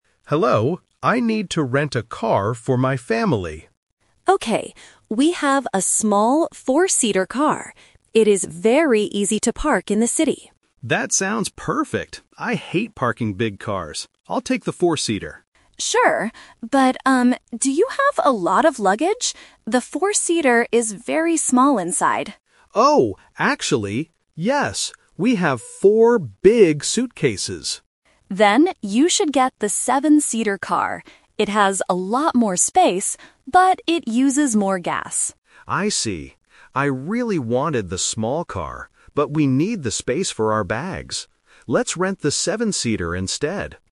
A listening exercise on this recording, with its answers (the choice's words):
Listen to the conversation and choose the correct answer (A, B, or C).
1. What is good about the 4-seater car?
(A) It is very cheap to rent.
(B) It is easy to park.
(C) It has a lot of space.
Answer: It is easy to park.

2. What does the agent say about the 7-seater car?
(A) It uses more gas.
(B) It is very small inside.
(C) It is difficult to drive.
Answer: It uses more gas.

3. Which car does the tourist decide to rent?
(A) The 4-seater, because it is easy to park.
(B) The 7-seater, because they have a lot of luggage.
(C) He decides to look for a different rental company.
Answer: The 7-seater, because they have a lot of luggage.

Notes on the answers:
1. The agent clearly says that the 4-seater car is "very easy to park in the city." Option A is a plausible guess for a small car, but the price is not mentioned. Option C is a trap because having a lot of space is a feature of the 7-seater car.
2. The agent tells the tourist that the 7-seater "uses more gas." Option B is a trap because the 4-seater is the one that is very small inside. Option C is a plausible guess for a big car, but the agent never says it is difficult to drive.
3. This question uses the "Twist" technique. The tourist initially plans to rent the 4-seater because he hates parking big cars. However, when the agent asks about luggage, he realizes they have four big suitcases and need more space. He changes his mind and rents the 7-seater. Option A is the main trap (his original plan). Option C is incorrect.